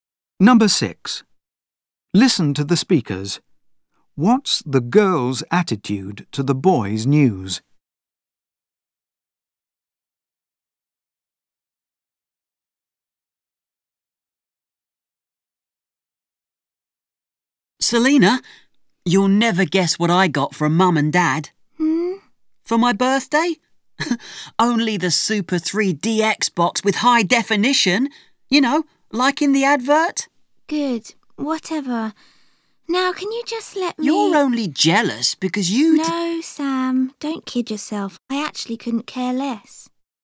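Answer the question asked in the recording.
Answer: She doesn't care (she's indifferent)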